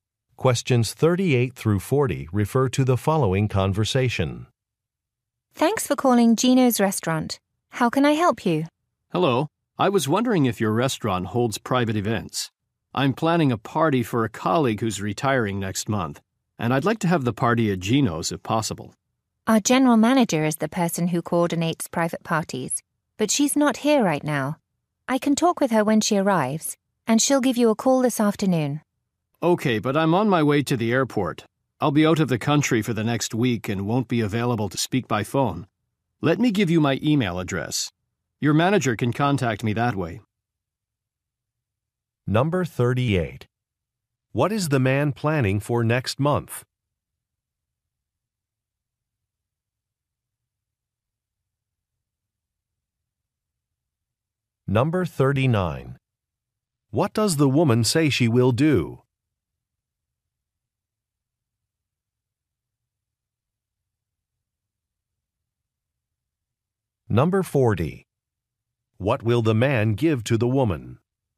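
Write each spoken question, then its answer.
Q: What is the man planning for next month?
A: A retirement party for a colleague

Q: What does the woman say she will do?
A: Talk with the general manager

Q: What will the man give to the woman?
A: His email address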